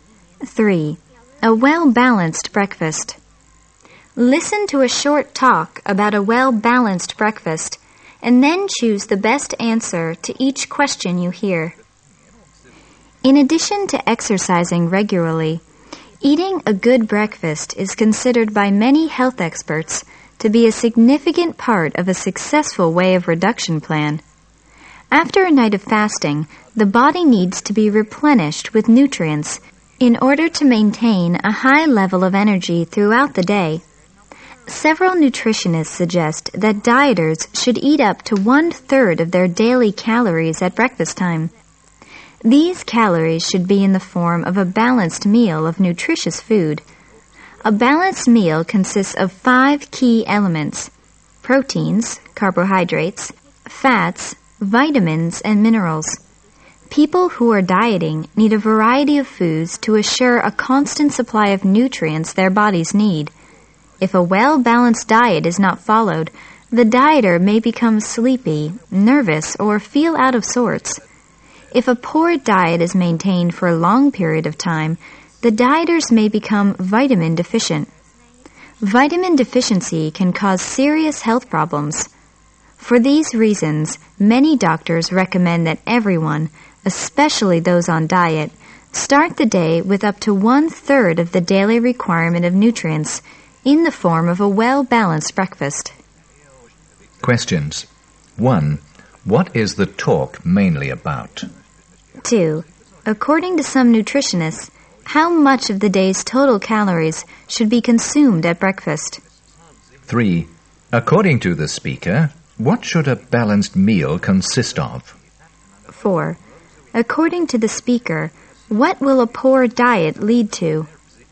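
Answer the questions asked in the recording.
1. The importance of a well-balanced breakfast, especially for dieters
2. Up to one third
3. Proteins, carbohydrates, fats, vitamins and minerals
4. Vitamin deficiency, which can cause serious health problems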